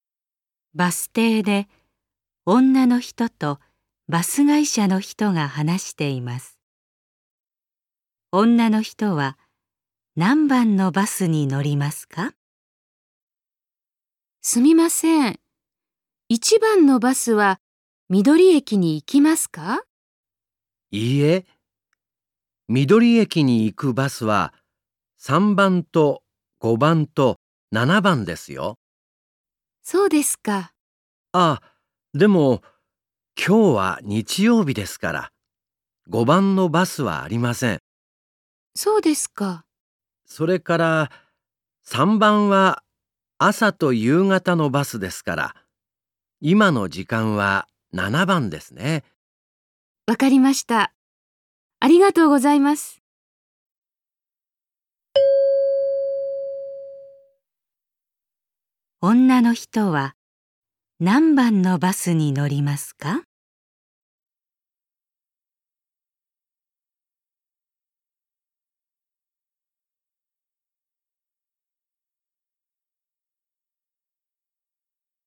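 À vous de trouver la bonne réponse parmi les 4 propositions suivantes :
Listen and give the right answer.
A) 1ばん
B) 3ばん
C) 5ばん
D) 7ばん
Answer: D) 7ばん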